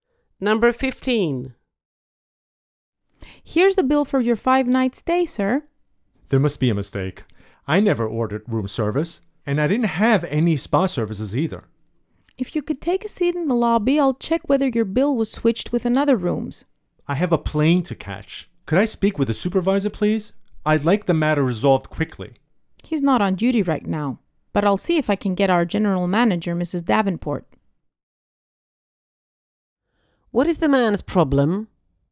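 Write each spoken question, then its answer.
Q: What is the man's problem?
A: His bill has charges for room service and spa services he didn't use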